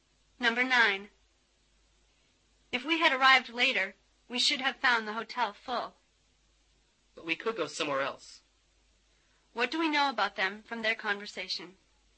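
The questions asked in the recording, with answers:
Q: What do we know about them from their conversation?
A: They arrived early enough to get a room at the hotel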